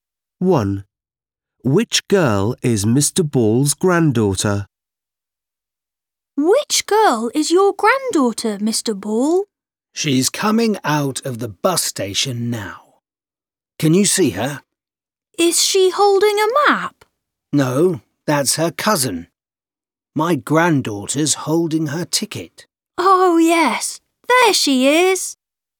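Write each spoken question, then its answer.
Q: Which girl is Mr. Ball's granddaughter?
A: The girl holding her ticket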